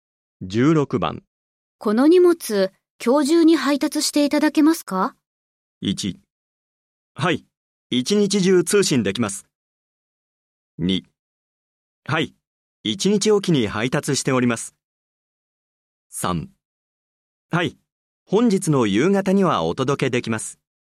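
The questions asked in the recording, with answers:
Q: この荷物、今日中に配達していただけますか?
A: 3: はい、本日の夕方にはお届けできます。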